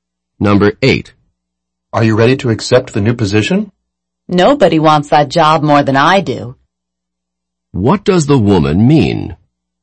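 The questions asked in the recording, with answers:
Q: What does the woman mean?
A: She really wants the job and is ready to accept it.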